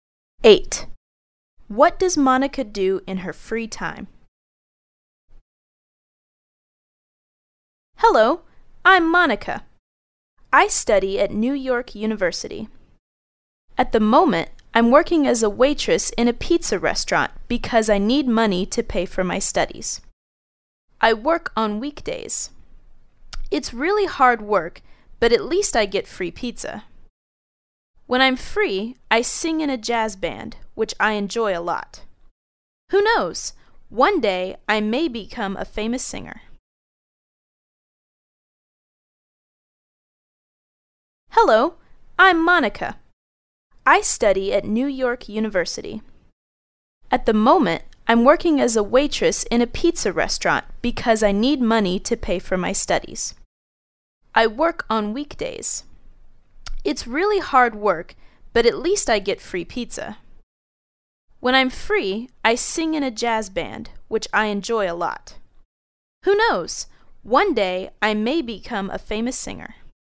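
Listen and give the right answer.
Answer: She sings in a jazz band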